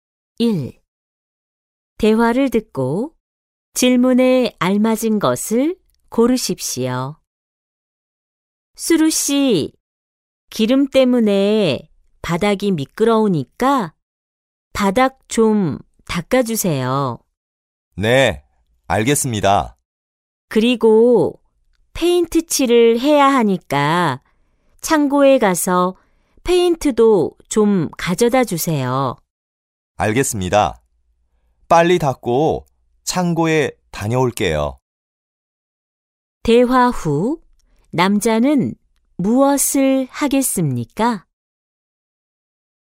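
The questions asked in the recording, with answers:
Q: 대화 후 남자는 무엇을 하겠습니까?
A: 바닥을 닦습니다 (그 다음 창고에 가서 페인트를 가져옵니다).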